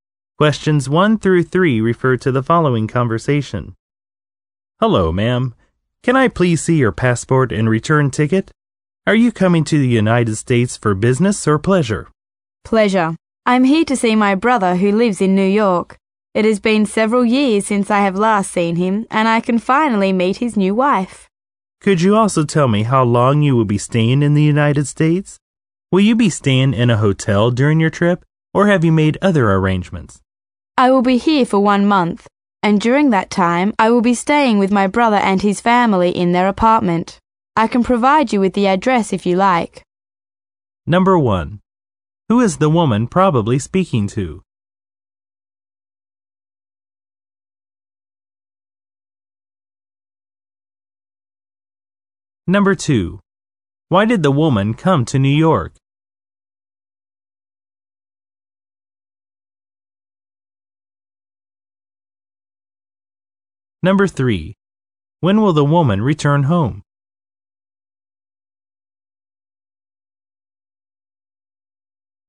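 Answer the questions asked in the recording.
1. An immigration/customs officer
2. To visit her brother
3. In one month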